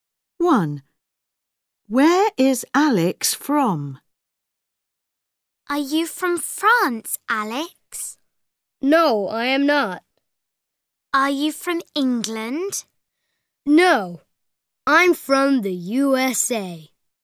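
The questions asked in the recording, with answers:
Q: Where is Alex from?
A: the USA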